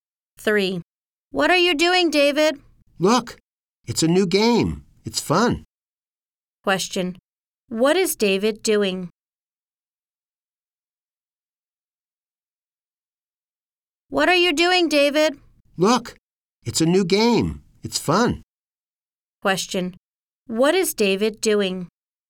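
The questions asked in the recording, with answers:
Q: What is David doing?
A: Playing a new game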